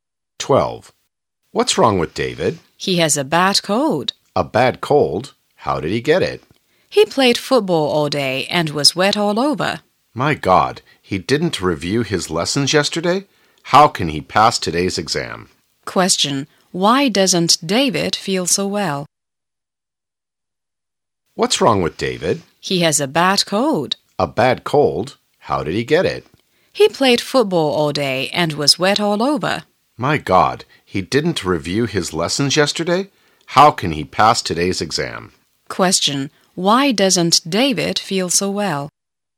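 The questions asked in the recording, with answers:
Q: Question, why doesn't David feel so well?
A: He has a bad cold from playing football all day and getting wet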